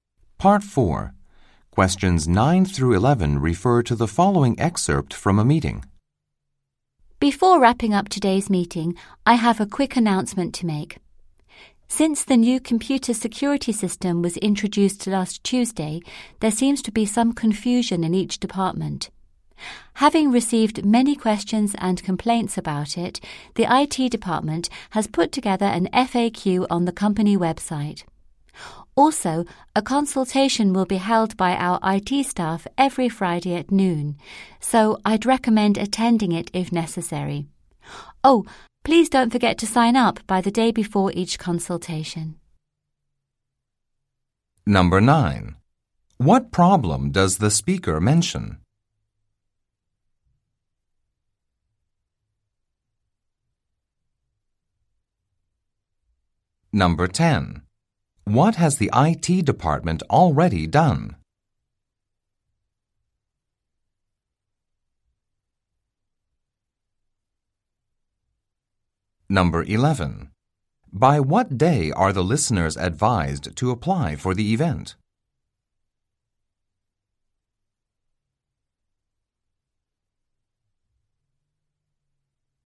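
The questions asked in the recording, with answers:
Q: What problem does the speaker mention?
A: Staff are confused about the new computer security system

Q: What has the IT department already done?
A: Put together an FAQ on the company website

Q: By what day are the listeners advised to apply for the event?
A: Thursday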